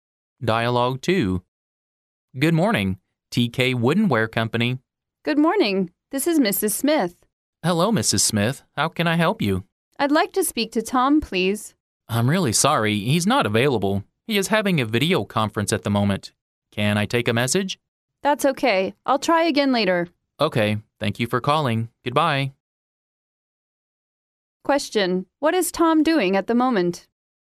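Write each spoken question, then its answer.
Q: what is Tom doing at the moment?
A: He is having a video conference.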